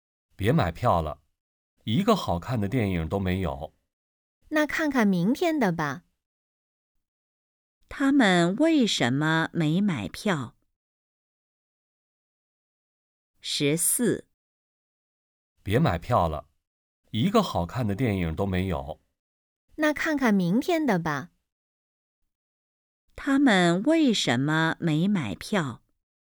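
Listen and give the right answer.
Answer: 没有好看的电影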